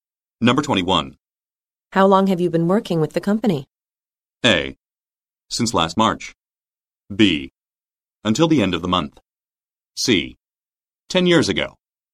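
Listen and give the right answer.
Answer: A: Since last March.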